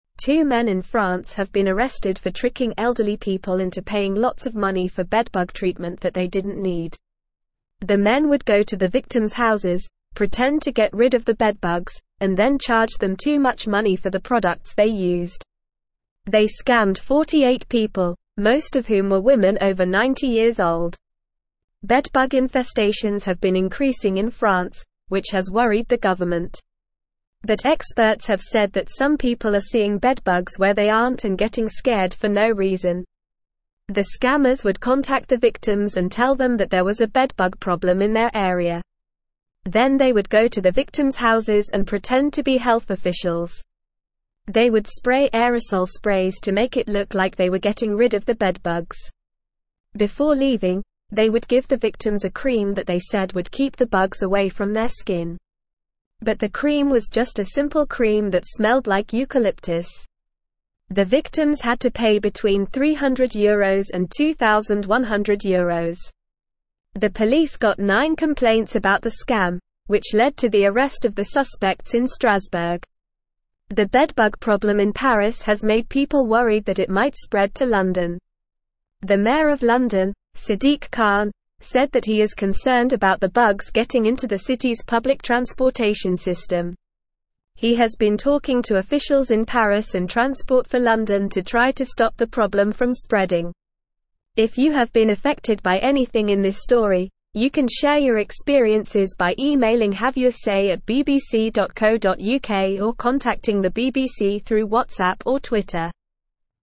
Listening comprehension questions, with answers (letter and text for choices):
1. How did the scammers trick elderly people into paying for unnecessary bedbug treatment?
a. They told the victims there was a bedbug problem in their area and scared them.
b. They gave the victims a cream that smelled like eucalyptus.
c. They contacted the victims and pretended to be health officials.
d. They pretended to get rid of the bedbugs and charged too much money for the products.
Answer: d. They pretended to get rid of the bedbugs and charged too much money for the products.

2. Who were the main targets of the scammers?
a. Men over 90 years old.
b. Women under 90 years old.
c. Women over 90 years old.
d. Men under 90 years old.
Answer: c. Women over 90 years old.

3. How many people were scammed by the two men?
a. 48 people.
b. 9 people.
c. 90 people.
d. 2 people.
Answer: a. 48 people.

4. What did the scammers spray in the victims' houses?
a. Bedbug repellent cream.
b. Aerosol sprays.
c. Eucalyptus-scented cream.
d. Health officials.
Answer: b. Aerosol sprays.

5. How can people share their experiences related to this story?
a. By calling the police.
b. By sharing their experiences on social media.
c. By contacting the mayor of London.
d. By emailing or contacting the BBC through WhatsApp or Twitter.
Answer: d. By emailing or contacting the BBC through WhatsApp or Twitter.

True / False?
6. They would spray aerosol sprays to make it seem like they were getting rid of the bedbugs.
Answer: True

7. The victims were given a cream that was supposed to attract bugs, but it was just a simple cream without any scent.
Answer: False

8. The victims had to pay between €100 and €900 for the necessary treatment.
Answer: False

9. Two men in France have been arrested for tricking elderly people into paying for unnecessary bedbug treatment.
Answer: True

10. Bedbug infestations have been increasing in France, causing concern for the government.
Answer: True

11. The scammers targeted mostly young women under the age of 30.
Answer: False

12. Some people are rightly seeing bedbugs where they aren't and getting scared for valid reasons, according to experts.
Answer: False

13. The scammers would contact the victims and pretend to be health officials.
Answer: True

Listen and Fill in the Gaps:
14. Two men in France have been arrested for (1)______ elderly people into (2)______ lots of money for bedbug treatment that they didn't need.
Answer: tricking

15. Two men in France have been arrested for (1)______ elderly people into (2)______ lots of money for bedbug treatment that they didn't need.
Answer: paying

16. The men would go to the victims' houses, pretend to get rid of the bedbugs, and then charge them too much money for the (3)______ they used.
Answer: products

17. Bedbug (4)______ have been increasing in France, which has worried the (5)______.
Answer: infestations

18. Bedbug (4)______ have been increasing in France, which has worried the (5)______.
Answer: government

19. But experts have said that some (6)______ are seeing bedbugs where they aren't and getting scared for no reason.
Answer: people

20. The scammers would contact the victims and tell them that there was a bedbug (7)______ in their area.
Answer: problem

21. They would spray (8)______ sprays to make it look like they were getting rid of the bedbugs.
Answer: aerosol

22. Before leaving, they would give the victims a (9)______ that they said would keep the bugs away from their skin.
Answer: cream

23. But the cream was just a (10)______ cream that smelled like eucalyptus.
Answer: simple

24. The bedbug problem in (11)______ has made people (12)______ that it might spread to London.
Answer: Paris

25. The bedbug problem in (11)______ has made people (12)______ that it might spread to London.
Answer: worried

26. The (13)______ of London, Sadiq Khan, said that he is concerned about the bugs getting into the city's public transportation system.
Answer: mayor

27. If you have been affected by anything in this (14)______, you can share your (15)______ by (16)______ or contacting the BBC through WhatsApp or Twitter.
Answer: story

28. If you have been affected by anything in this (14)______, you can share your (15)______ by (16)______ or contacting the BBC through WhatsApp or Twitter.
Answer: experiences

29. If you have been affected by anything in this (14)______, you can share your (15)______ by (16)______ or contacting the BBC through WhatsApp or Twitter.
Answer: emailing

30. What did the two men in France do to trick elderly people?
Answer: The two men tricked elderly people by pretending to get rid of bedbugs in their homes and then charging them too much money for the products they used.

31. Who were the majority of the victims of the scam?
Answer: The majority of the victims were women over 90 years old.

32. Why has the bedbug problem in France worried the government?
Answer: The bedbug problem in France has worried the government because it has been increasing and spreading, causing concern for public health and safety.

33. How did the scammers pretend to get rid of the bedbugs?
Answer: The scammers pretended to get rid of the bedbugs by spraying aerosol sprays in the victims' homes, making it look like they were taking care of the problem.

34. What did the scammers give the victims before leaving?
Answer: Before leaving, the scammers gave the victims a cream that they claimed would keep the bedbugs away from their skin.

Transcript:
Two men in France have been arrested for tricking elderly people into paying lots of money for bedbug treatment that they didn't need. The men would go to the victims' houses, pretend to get rid of the bedbugs, and then charge them too much money for the products they used. They scammed 48 people, most of whom were women over 90 years old. Bedbug infestations have been increasing in France, which has worried the government. But experts have said that some people are seeing bedbugs where they aren't and getting scared for no reason.
The scammers would contact the victims and tell them that there was a bedbug problem in their area. Then they would go to the victims' houses and pretend to be health officials. They would spray aerosol sprays to make it look like they were getting rid of the bedbugs. Before leaving, they would give the victims a cream that they said would keep the bugs away from their skin. But the cream was just a simple cream that smelled like eucalyptus. The victims had to pay between €300 and €2,100. The police got nine complaints about the scam, which led to the arrest of the suspects in Strasbourg.
The bedbug problem in Paris has made people worried that it might spread to London. The mayor of London, Sadiq Khan, said that he is concerned about the bugs getting into the city's public transportation system. He has been talking to officials in Paris and Transport For London to try to stop the problem from spreading. If you have been affected by anything in this story, you can share your experiences by emailing or contacting the BBC through WhatsApp or Twitter.

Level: Level 3